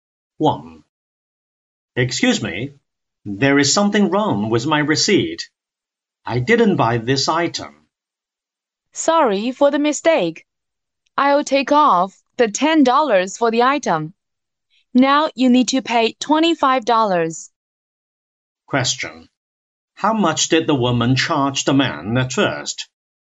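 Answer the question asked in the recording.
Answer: $35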